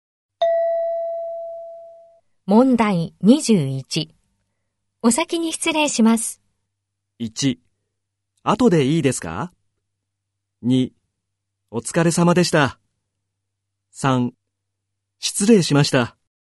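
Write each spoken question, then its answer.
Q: お先に失礼します。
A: 2: お疲れ様でした。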